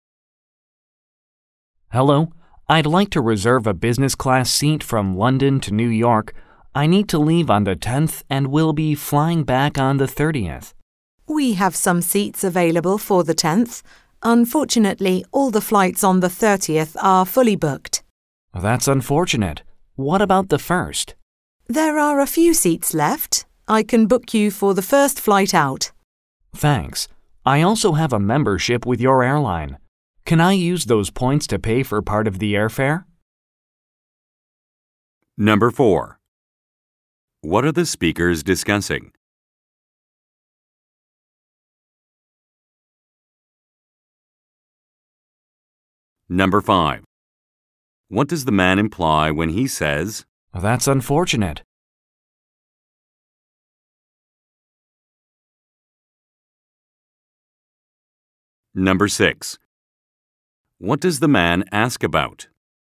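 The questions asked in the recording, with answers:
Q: What are the speakers discussing?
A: Booking a business class flight from London to New York

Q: What does the man ask about?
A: Using his membership points to pay for part of the airfare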